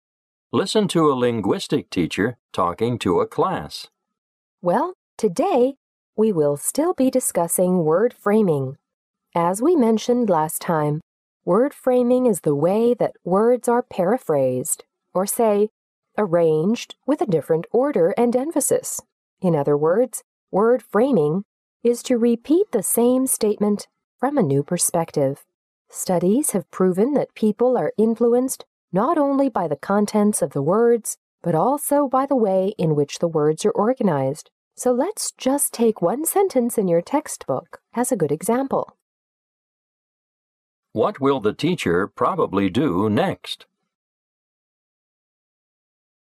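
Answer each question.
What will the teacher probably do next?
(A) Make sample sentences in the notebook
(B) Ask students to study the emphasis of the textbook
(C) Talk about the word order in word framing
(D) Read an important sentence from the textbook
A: (D) Read an important sentence from the textbook

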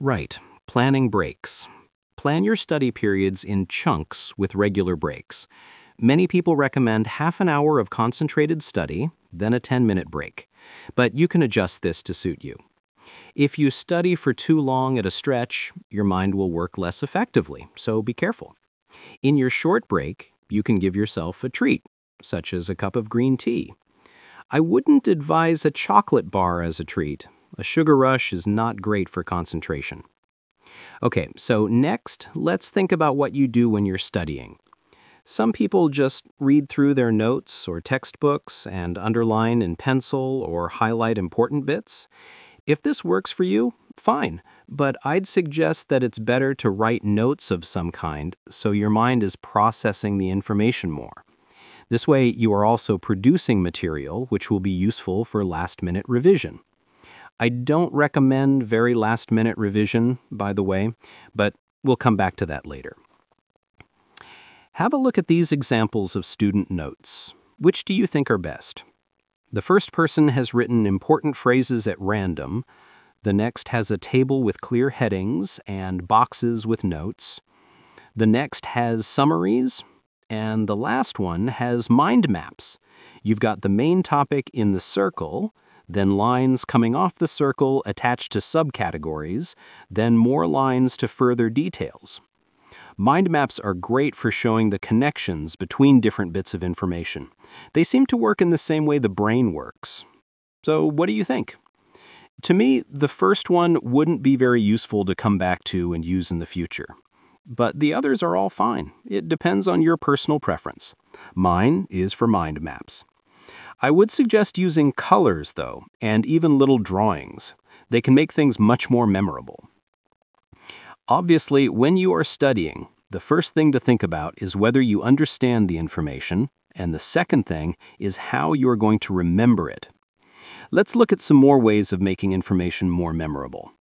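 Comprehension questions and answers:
Talk/Lecture 2: You will hear a talk about how to prepare for exams.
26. You should plan your studying and take regular.....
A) breaks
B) exercises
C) revisions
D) naps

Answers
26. A) breaks

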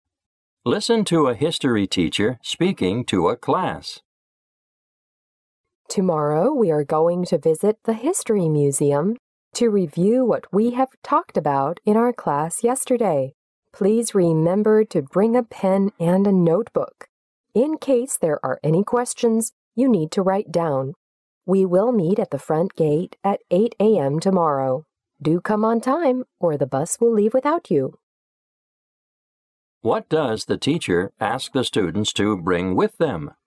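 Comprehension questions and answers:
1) What does the teacher ask the students to bring with them?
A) A water bottle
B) A pen and a notebook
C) The bus ticket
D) The museum ticket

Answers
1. B) A pen and a notebook

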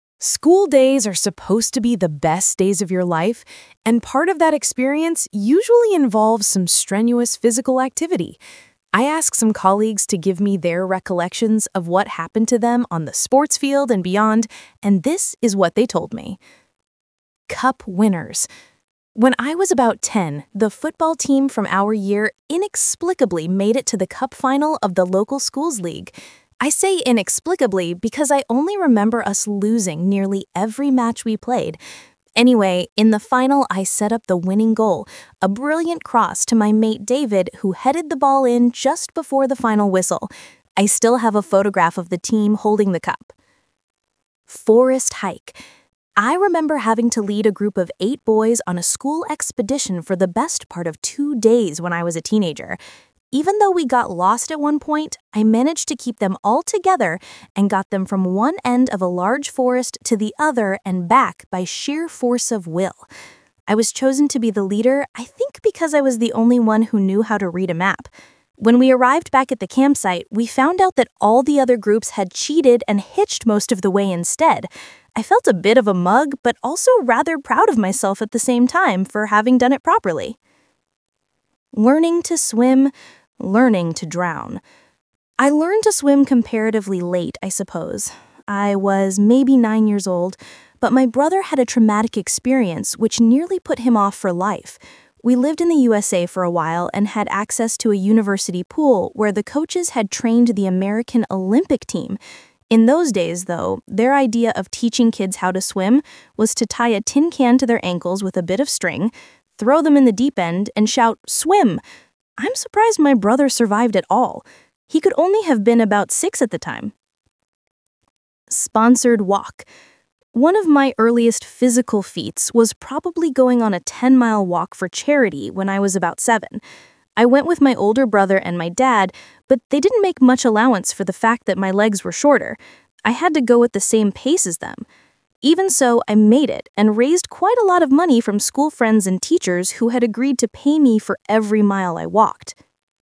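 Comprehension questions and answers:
Talk/Lecture 1: You will hear people talking about sports.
What did the first person do in the schools' cup final?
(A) He scored the winning goal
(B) He provided the pass for the final goal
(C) He blew the whistle at the end of the game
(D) Hold the final cup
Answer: (B) He provided the pass for the final goal

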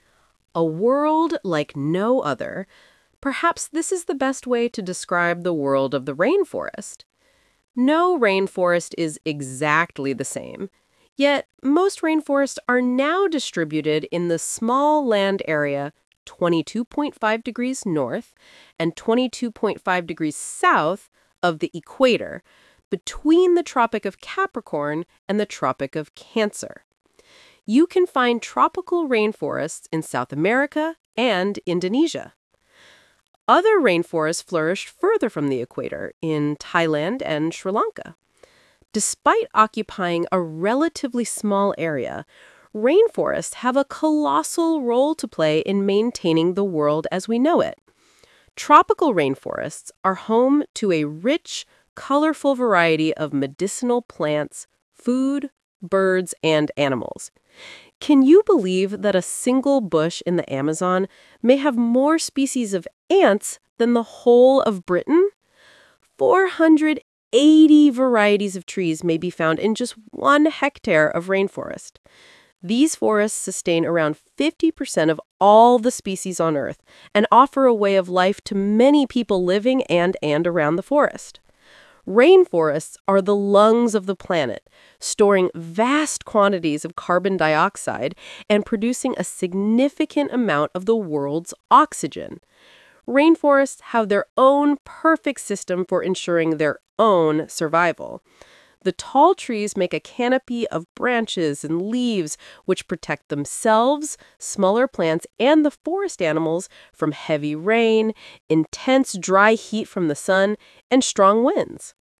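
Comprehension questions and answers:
Talk/Lecture 3: You will hear a talk about rainforests.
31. Rainforests can be found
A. only in South America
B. in many countries all over the world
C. in a small strip of land, mostly equatorial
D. in the whole world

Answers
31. C. in a small strip of land, mostly equatorial

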